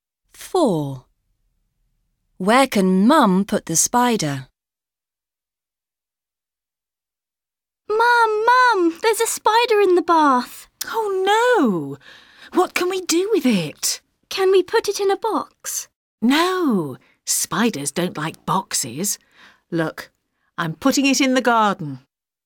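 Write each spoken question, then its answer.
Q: Where can Mum put the spider?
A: In the garden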